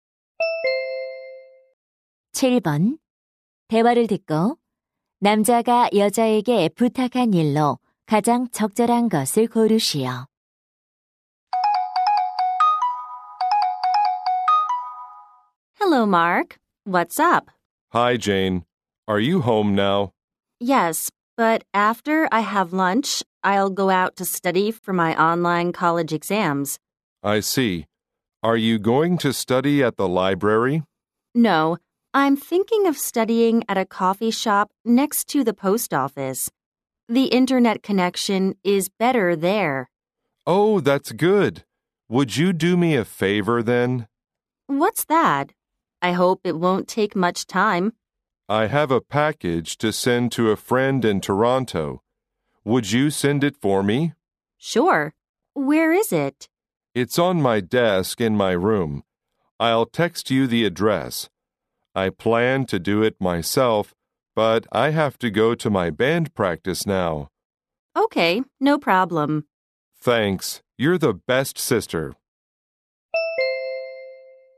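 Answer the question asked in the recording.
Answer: 토론토에 있는 친구에게 소포 보내 주기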